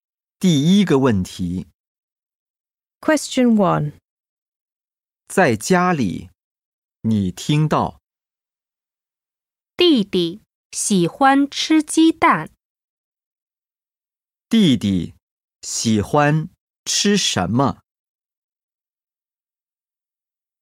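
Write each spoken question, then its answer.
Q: 弟弟喜欢吃什么?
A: 鸡蛋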